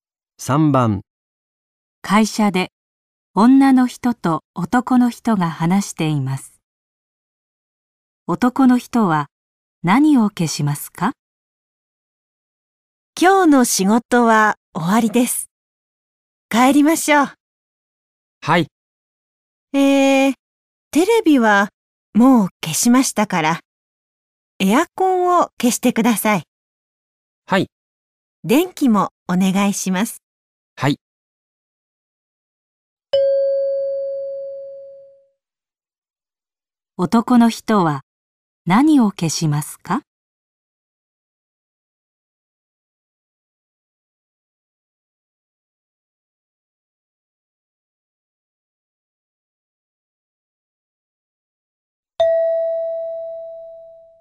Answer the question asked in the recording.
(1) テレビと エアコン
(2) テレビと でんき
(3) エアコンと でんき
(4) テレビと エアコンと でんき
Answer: (3) エアコンと でんき

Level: N5 Listening · Test 3